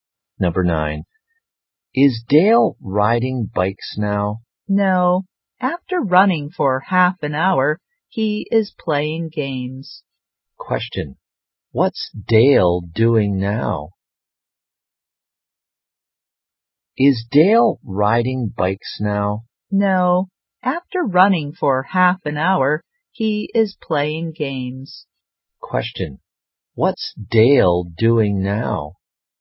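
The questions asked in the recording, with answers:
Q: What's Dale doing now?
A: Playing games.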